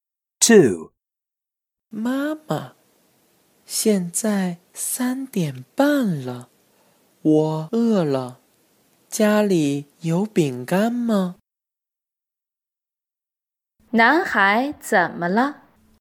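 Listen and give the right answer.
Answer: 他饿了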